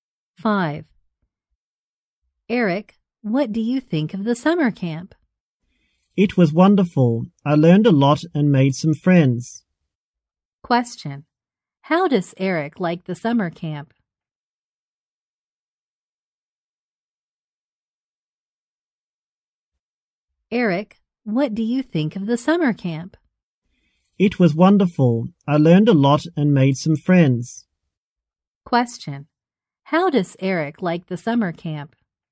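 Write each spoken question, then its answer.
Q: How does Eric like the summer camp?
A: It was wonderful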